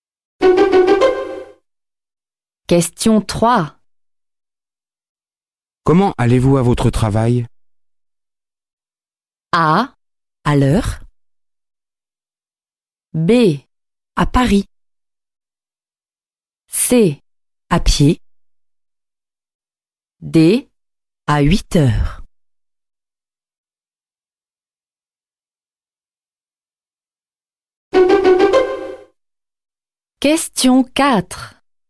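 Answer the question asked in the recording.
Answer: À pied.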